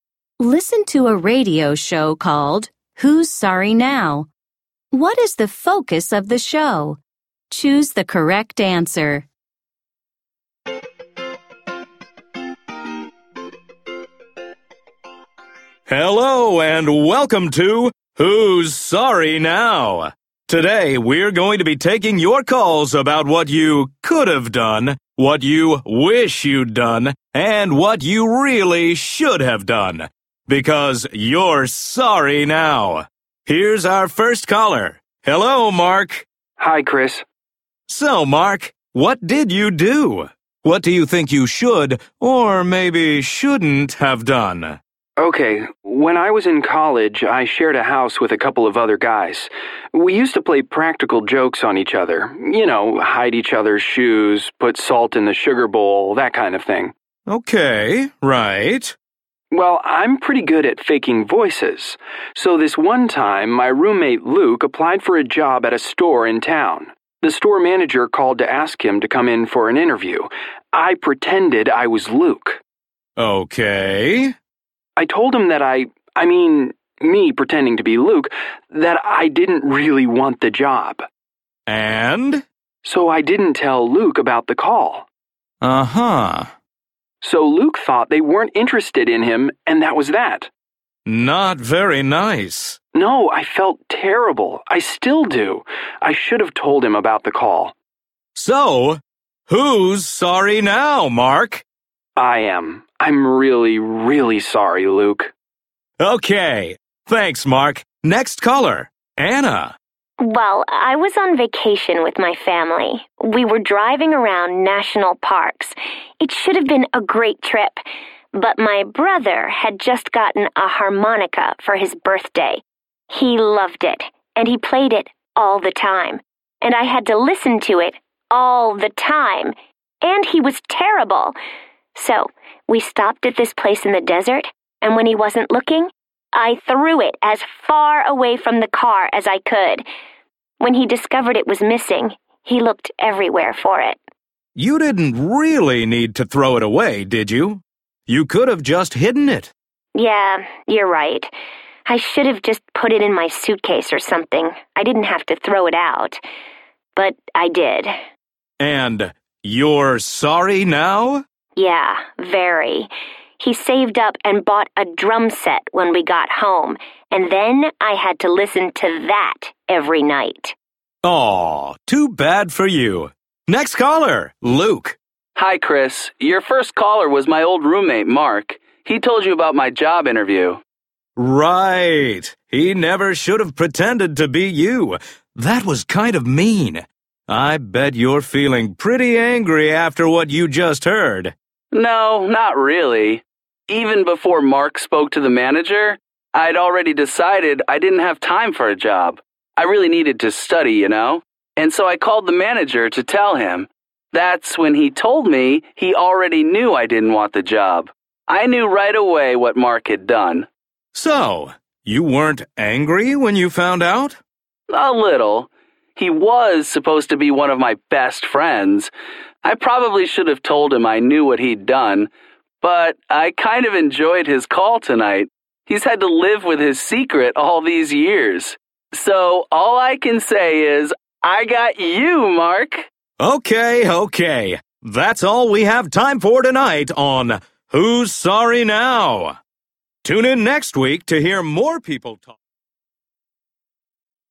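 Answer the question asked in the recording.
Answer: Callers talk about things they regret doing and wish they had done differently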